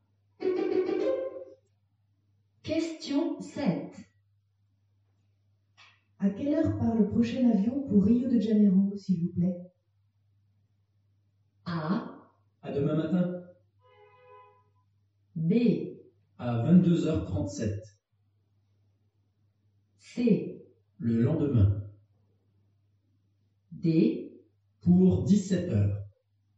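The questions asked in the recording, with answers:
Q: À quelle heure part le prochain avion pour Rio de Janeiro, s'il vous plaît?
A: B: À 22h37.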